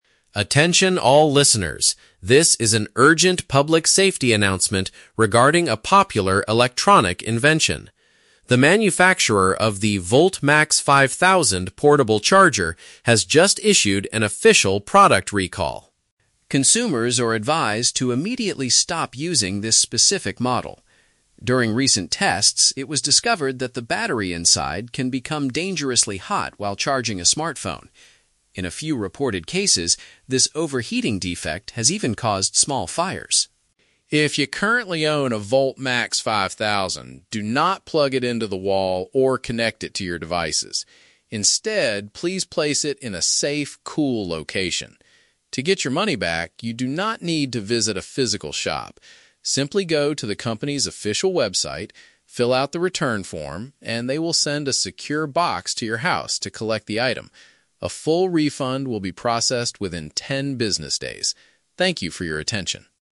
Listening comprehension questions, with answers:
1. What is the main problem with the portable charger?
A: It reaches unsafe temperatures that could lead to flames.

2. What should owners of the VoltMax 5000 do immediately?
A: Keep it in a low-temperature area and avoid using it.

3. How can customers receive their refund?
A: By completing a digital document on the internet.

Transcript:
Announcer: Attention all listeners. This is an urgent public safety announcement regarding a popular electronic invention. The manufacturer of the "VoltMax 5000" portable charger has just issued an official product recall.
Consumers are advised to immediately stop using this specific model. During recent tests, it was discovered that the battery inside can become dangerously hot while charging a smartphone. In a few reported cases, this overheating defect has even caused small fires.
If you currently own a VoltMax 5000, do not plug it into the wall or connect it to your devices. Instead, please place it in a safe, cool location. To get your money back, you do not need to visit a physical shop. Simply go to the company's official website, fill out the return form, and they will send a secure box to your house to collect the item. A full refund will be processed within ten business days. Thank you for your attention.